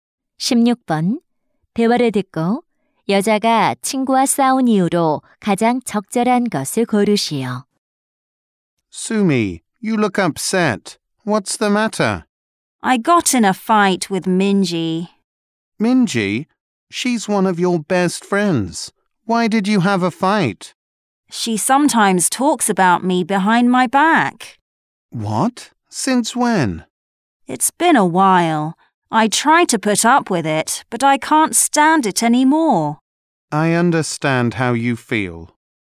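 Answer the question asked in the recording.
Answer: 친구가 뒤에서 자기 험담을 해서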